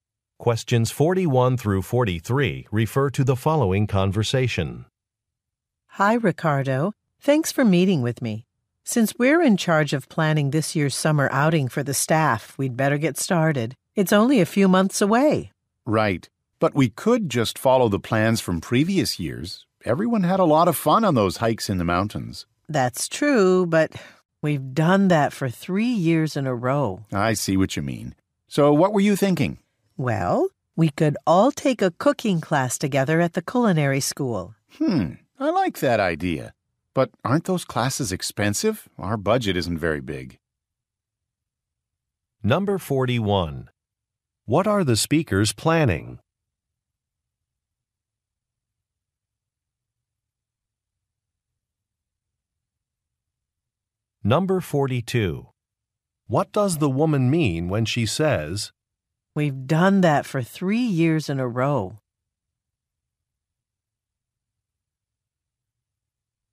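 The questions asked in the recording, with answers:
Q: What are the speakers planning?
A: A summer staff outing

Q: What does the woman mean when she says,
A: She wants to try a different activity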